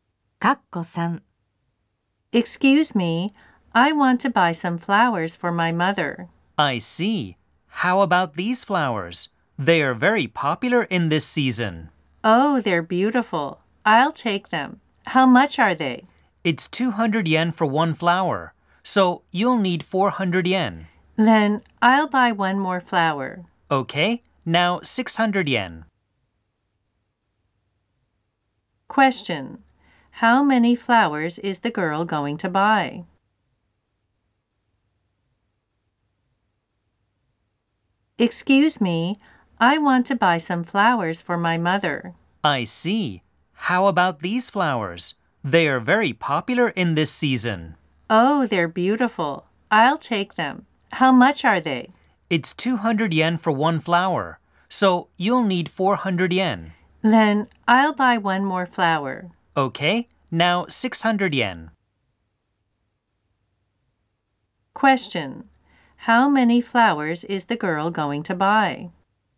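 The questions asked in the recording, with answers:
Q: Question: how many flowers is the girl going to buy?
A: Three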